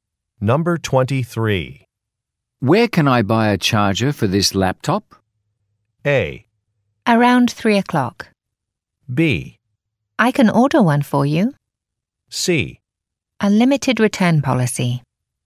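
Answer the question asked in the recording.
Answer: B: I can order one for you.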